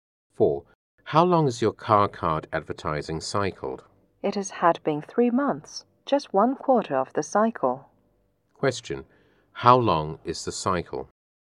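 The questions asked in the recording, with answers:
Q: how long is the cycle?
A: 12 months (one year)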